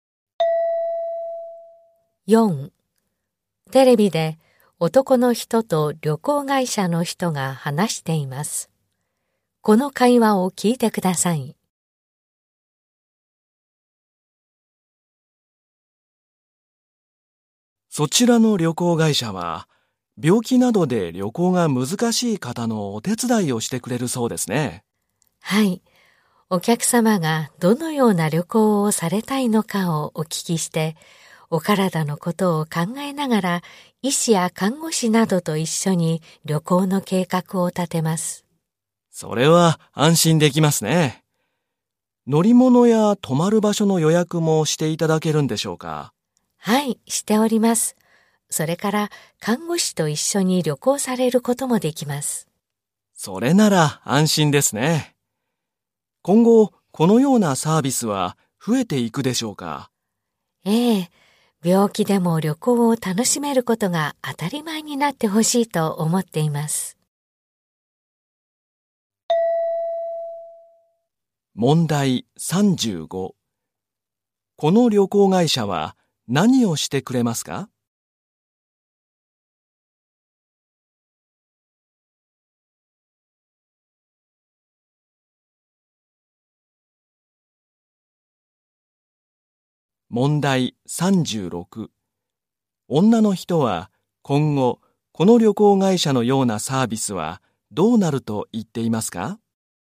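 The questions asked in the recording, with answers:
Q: この旅行会社は何をしてくれますか?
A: 医師や看護師と一緒に旅行の計画を立て、乗り物や宿の予約もしてくれる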